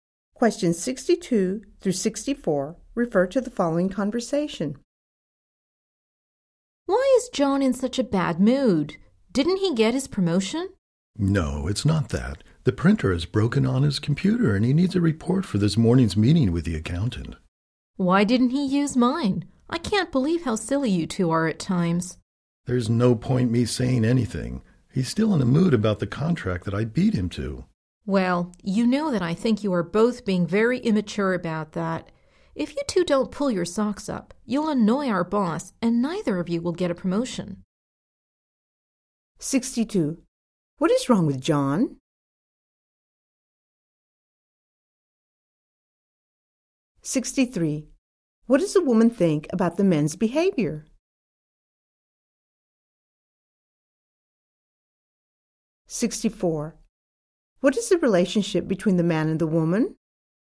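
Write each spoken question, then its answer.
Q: What is wrong with John?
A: His printer is broken and he needs a report

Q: What does the woman think about the men's behavior?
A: It is immature

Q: What is the relationship between the man and the woman?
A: Coworkers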